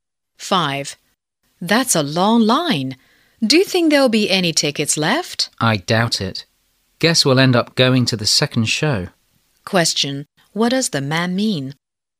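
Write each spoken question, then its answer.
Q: What does the man mean?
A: The tickets for this show are probably sold out; they'll go to the second show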